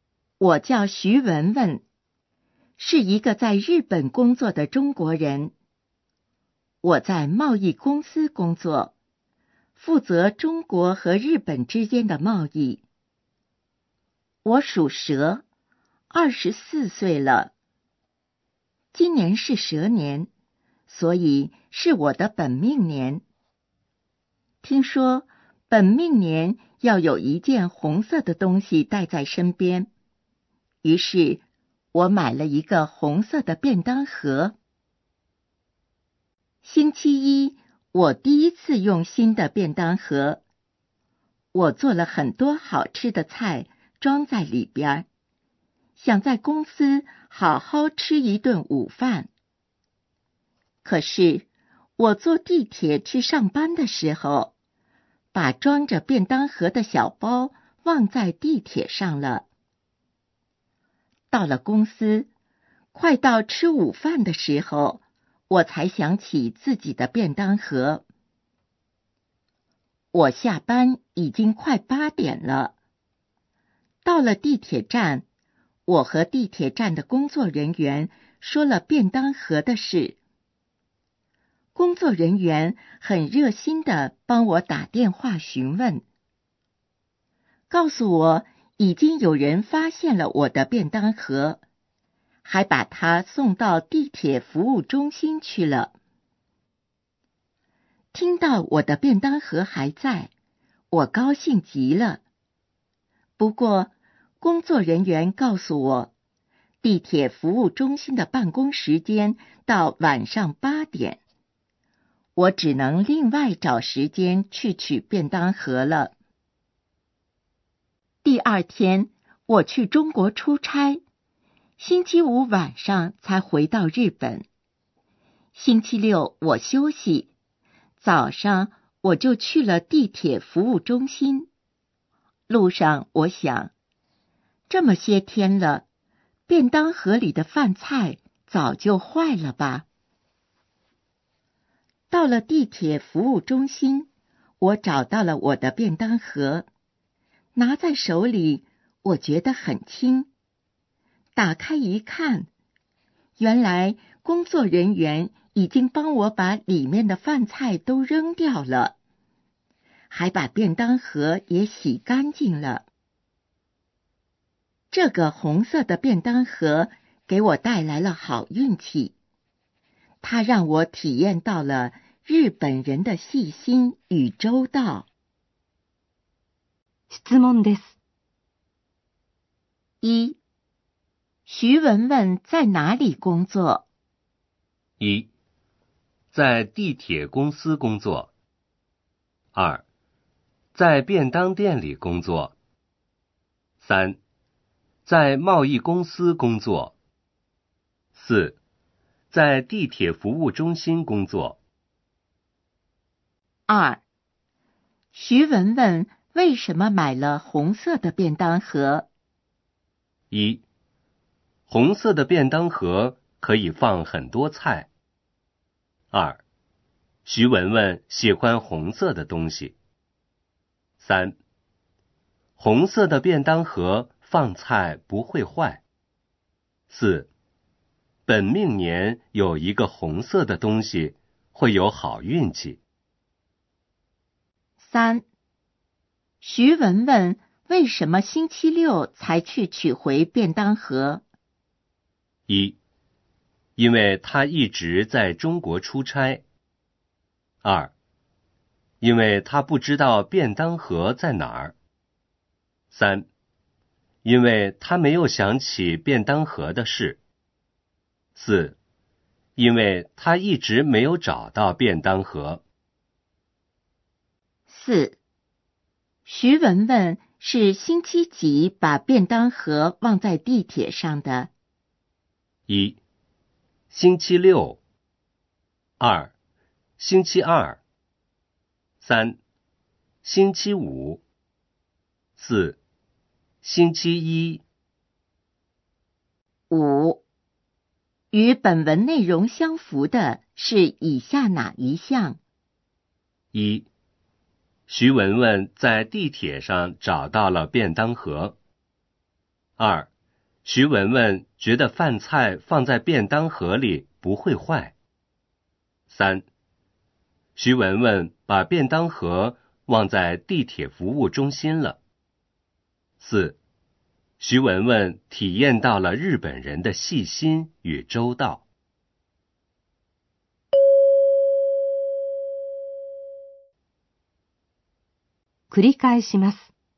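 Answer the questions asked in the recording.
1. 三: 在贸易公司工作。
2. 四: 本命年有一个红色的东西,会有好运气。
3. 一: 因为他一直在中国出差。
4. 四: 星期一。
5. 四: 徐文文体验到了日本人的细心与周到。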